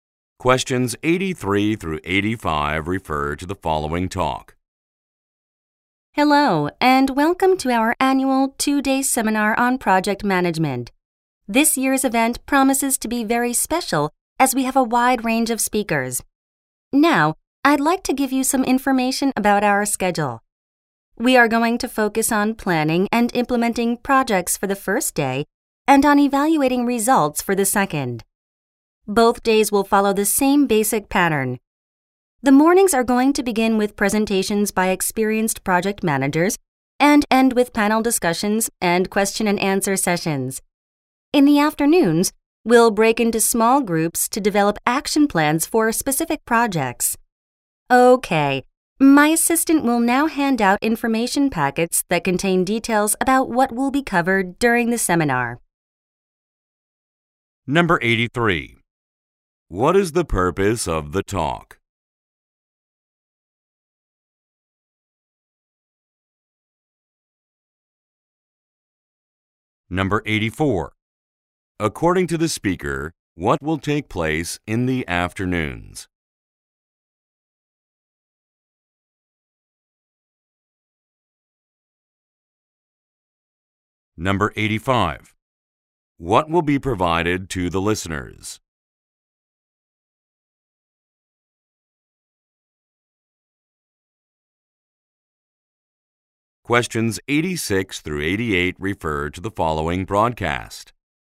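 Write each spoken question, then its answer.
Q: What is the purpose of the talk?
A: To give information about the seminar schedule

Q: According to the speaker, what will take place in the afternoons?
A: Small groups will develop action plans

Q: What will be provided to the listeners?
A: Information packets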